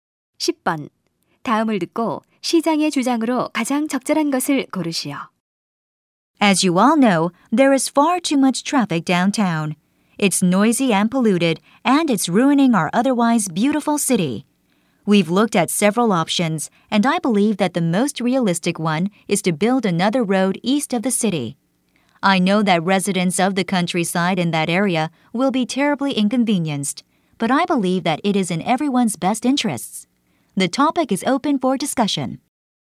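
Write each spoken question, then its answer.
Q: 다음을 듣고 시장의 주장으로 가장 적절한 것을 고르시오.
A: 도시 동쪽에 새 도로를 건설해야 한다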